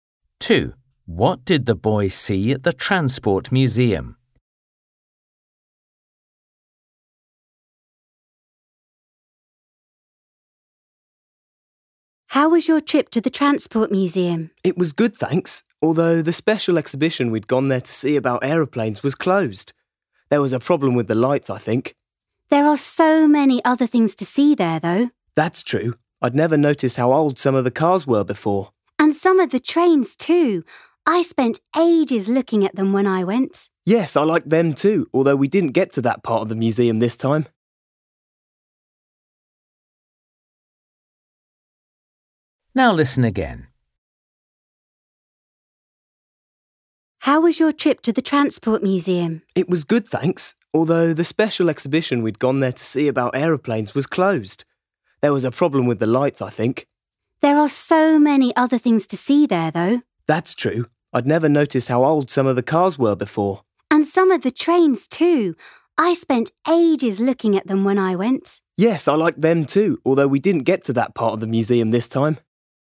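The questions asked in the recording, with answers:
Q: What did the boy see at the Transport Museum?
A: old cars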